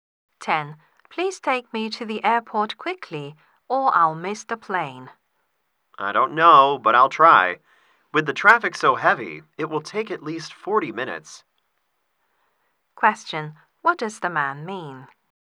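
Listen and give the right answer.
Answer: They may not arrive in time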